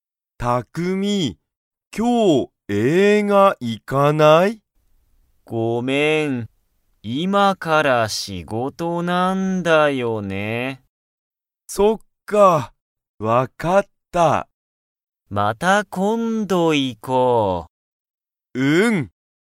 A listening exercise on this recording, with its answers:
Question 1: タクミは、今(いま)から____だ。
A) 映画(えいが)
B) 店(みせ)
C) 学校(がっこう)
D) 仕事(しごと)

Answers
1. D

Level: Level 1

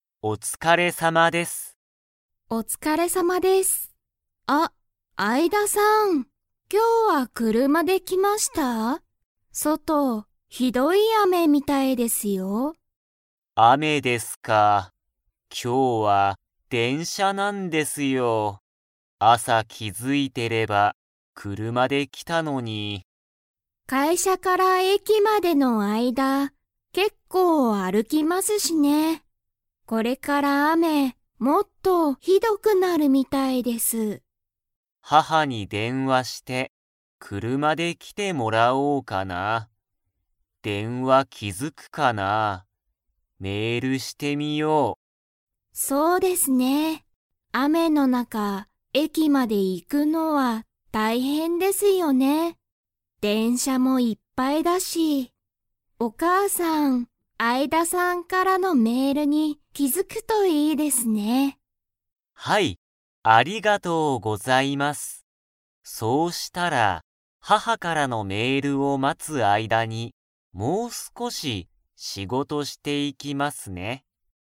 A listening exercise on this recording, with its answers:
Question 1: アイダさんは、何なにで会社かいしゃに来きましたか?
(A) 車くるま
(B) 電車でんしゃ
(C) バス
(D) 飛行機ひこうき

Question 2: アイダさんは、もう少すこし仕事しごとを 。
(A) していく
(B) していかない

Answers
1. B
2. A

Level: Level 3

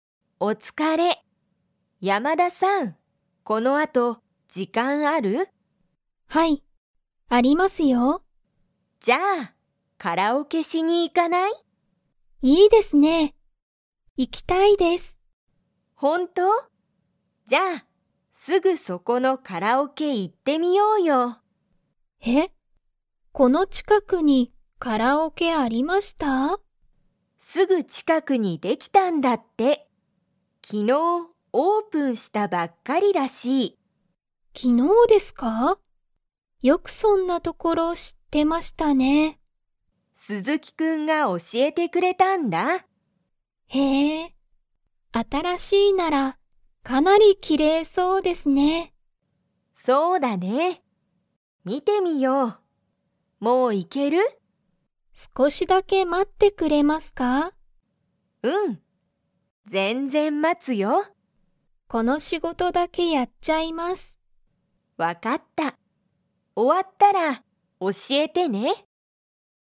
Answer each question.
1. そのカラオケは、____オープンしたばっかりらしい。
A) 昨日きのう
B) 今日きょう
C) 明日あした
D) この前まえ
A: A

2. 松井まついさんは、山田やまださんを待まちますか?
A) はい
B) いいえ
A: A

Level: Level 2

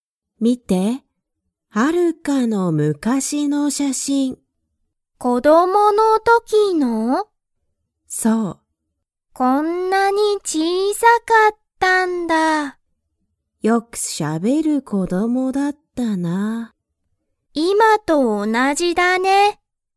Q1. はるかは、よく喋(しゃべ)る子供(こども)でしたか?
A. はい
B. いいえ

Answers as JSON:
{"1": "A"}

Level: Level 1

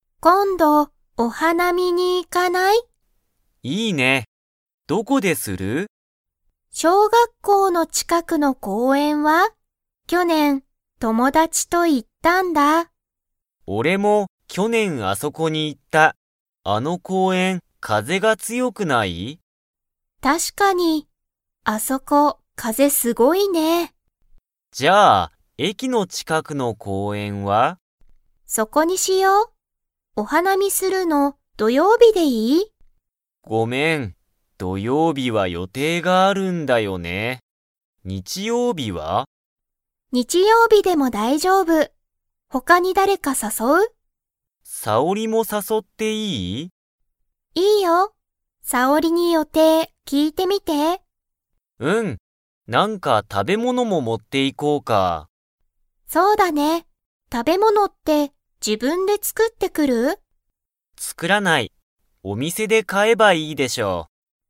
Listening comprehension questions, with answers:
Comprehension Quiz (Skip if you don't understand the conversation yet)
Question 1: サキとユウトは、どこの公園こうえんでお花見はなみをしますか?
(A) 小学校しょうがっこうの近ちかく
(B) 風かぜが強つよい場所ばしょ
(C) 駅えきの近ちかく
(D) お店みせの近ちかく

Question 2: サキとユウトは、食たべ物ものを自分じぶんで 。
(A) 作つくってくる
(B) 作つくってこない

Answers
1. C
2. B

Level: Level 4

